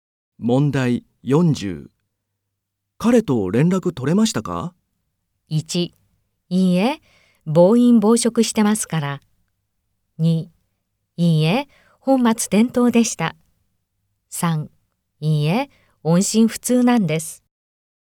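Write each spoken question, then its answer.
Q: 彼と連絡取れましたか?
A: 3: いいえ、音信不通なんです。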